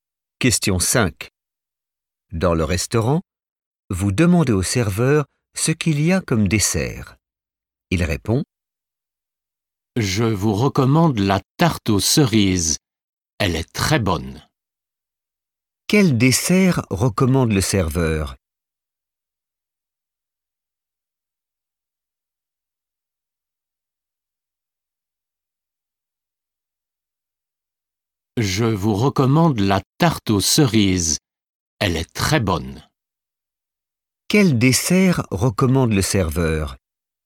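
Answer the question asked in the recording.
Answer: la tarte aux cerises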